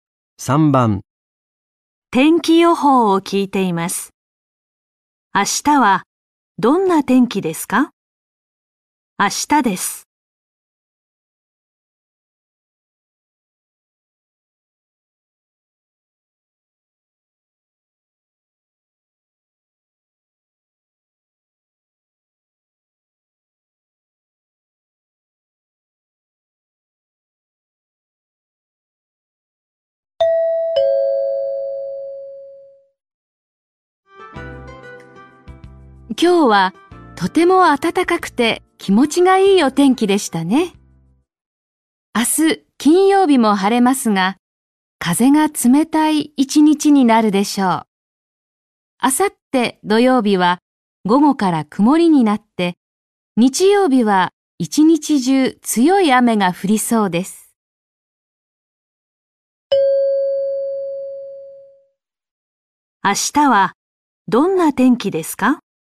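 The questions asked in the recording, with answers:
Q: 明日はどんな天気ですか?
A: 晴れるが風が冷たい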